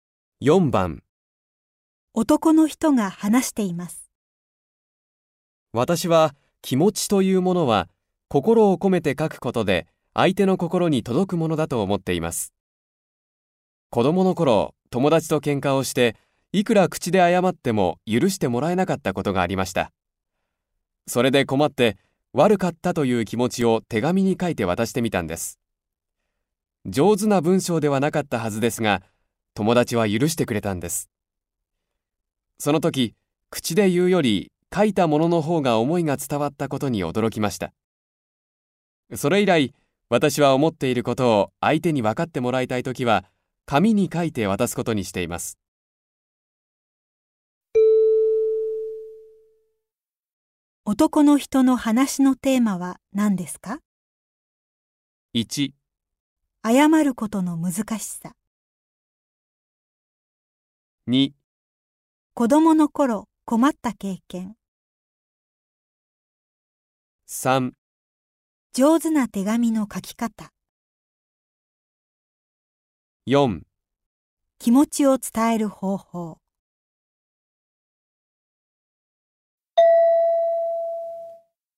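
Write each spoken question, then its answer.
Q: 男の人の話のテーマは何ですか?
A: 4: 気持ちを伝える方法。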